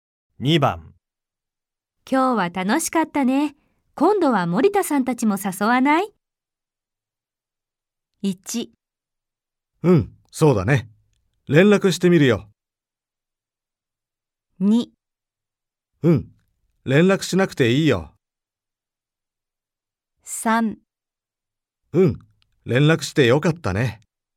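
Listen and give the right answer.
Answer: 1: うん、そうだね。連絡してみるよ。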